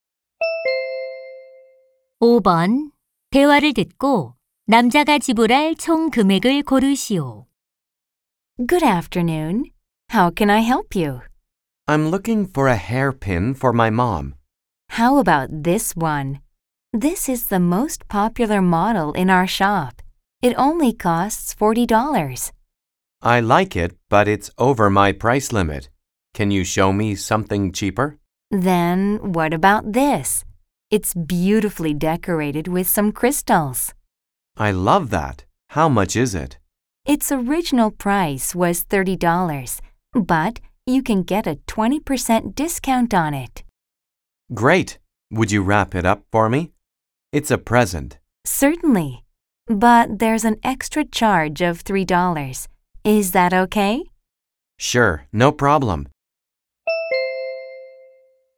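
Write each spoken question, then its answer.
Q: 대화를 듣고 남자가 지불할 총 금액을 고르시오.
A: 27달러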